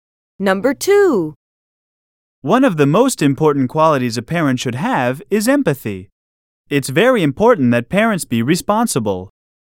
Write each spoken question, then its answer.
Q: One of the most important qualities a parent should have is empathy.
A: Different is the correct answer.